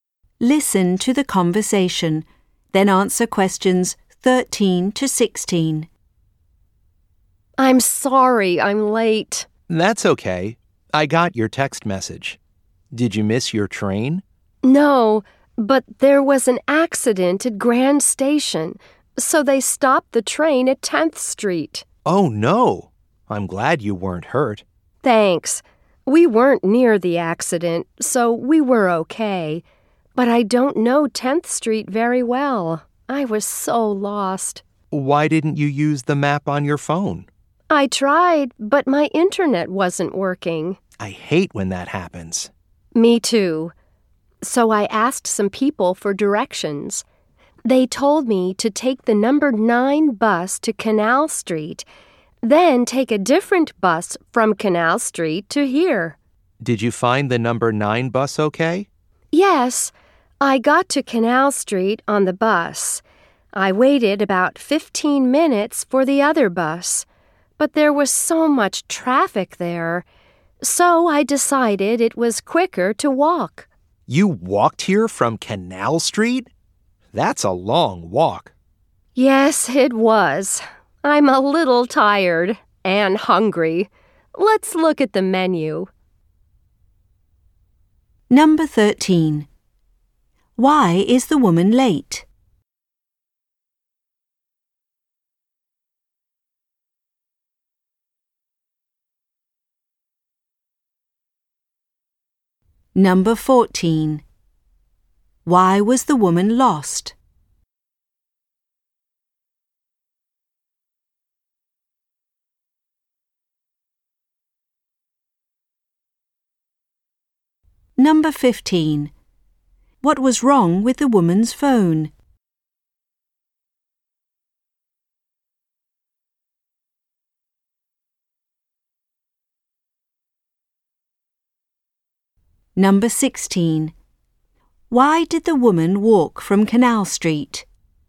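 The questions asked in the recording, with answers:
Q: Why is the woman late?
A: An accident at Grand Station stopped her train

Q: Why was the woman lost?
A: She didn't know 10th Street well

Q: What was wrong with the woman's phone?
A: Her internet wasn't working

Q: Why did the woman walk from Canal Street?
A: There was so much traffic that walking was quicker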